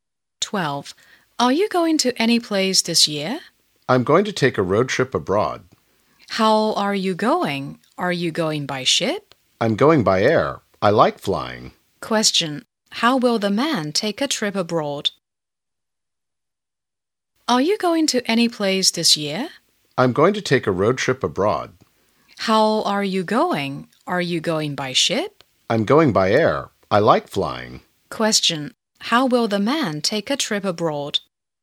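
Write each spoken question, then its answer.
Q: How will the man take a trip abroad?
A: By air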